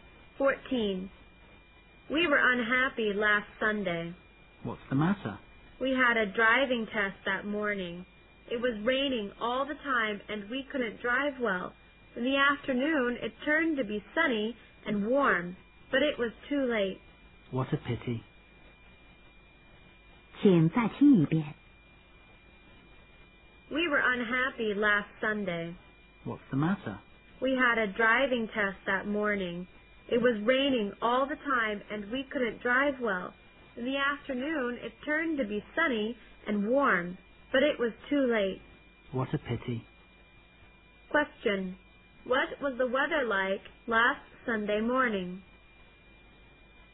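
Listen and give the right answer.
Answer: Rainy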